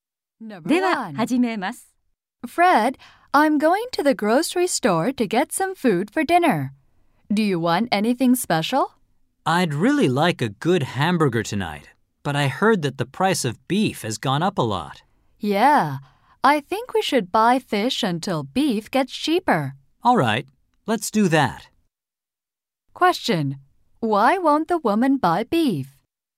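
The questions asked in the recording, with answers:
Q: Why won't the woman buy beef?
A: The price of beef has gone up a lot.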